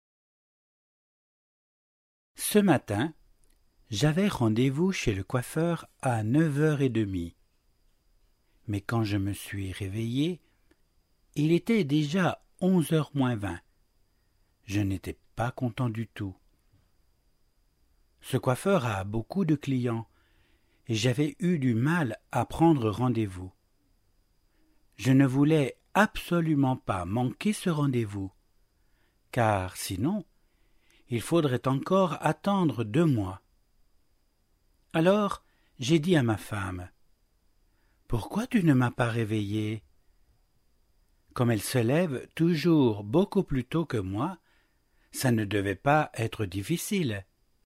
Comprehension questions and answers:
話の内容に合致している場合は 1を 一致しない場合は 2を記入してください。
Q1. Alain avait rendez-vous avec son client à neuf heures et demie.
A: 2

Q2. Quand Alain s'est réveillé, il n'était pas heureux.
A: 1

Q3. Il n'est pas facile de prendre rendez-vous chez le coiffeur d'Alain.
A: 1

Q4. Si l'on manque un rendez-vous chez le coiffeur d'Alain, il faut attendre 18 semaines.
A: 2

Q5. Alain se lève toujours plus tôt que sa femme.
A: 2

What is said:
Ce matin, j'avais rendez-vous chez le coiffeur à neuf heures et demie. Mais quand je me suis réveillé, il était déjà 11 heures moins 20. Je n'étais pas content du tout !
Ce coiffeur a beaucoup de clients et j'avais eu du mal à prendre rendez-vous. Je ne voulais absolument pas manquer ce rendez-vous. Car sinon, il faudrait encore attendre deux mois. Alors j'ai dit à ma femme : « Pourquoi tu ne m'as pas réveillé ? » Comme elle se lève toujours beaucoup plus tôt que moi, ça ne devait pas être difficile.